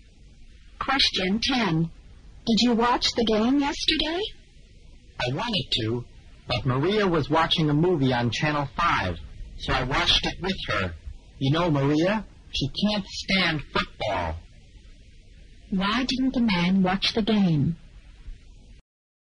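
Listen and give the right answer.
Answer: He watched a movie with Maria instead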